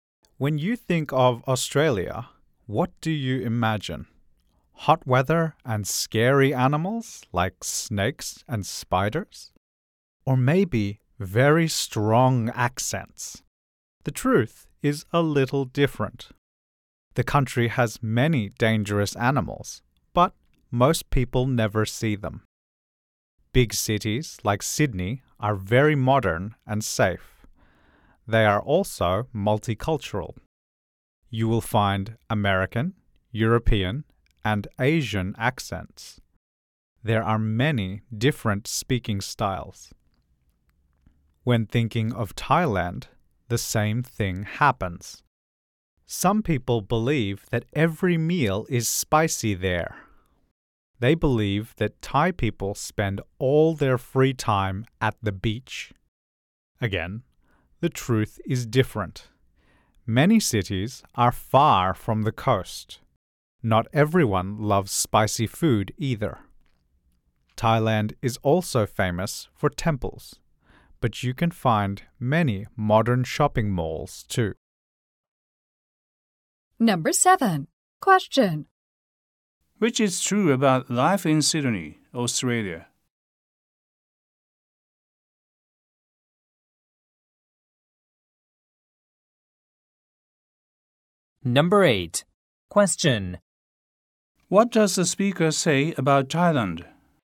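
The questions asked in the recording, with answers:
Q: Which is true about life in Sydney, Australia?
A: It is modern, safe and multicultural, with many different accents

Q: What does the speaker say about Thailand?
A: Many cities are far from the coast, not everyone loves spicy food, and there are many modern shopping malls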